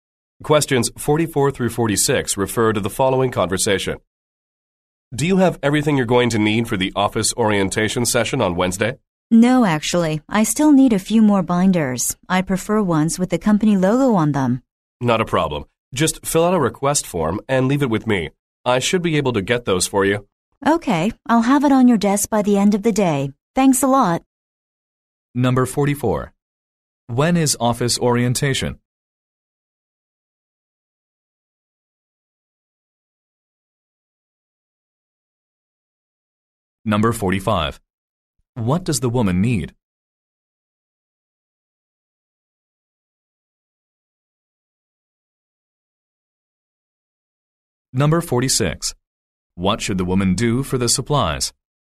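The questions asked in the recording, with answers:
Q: When is office orientation?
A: Wednesday

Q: What does the woman need?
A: More binders with the company logo

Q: What should the woman do for the supplies?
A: Fill out a request form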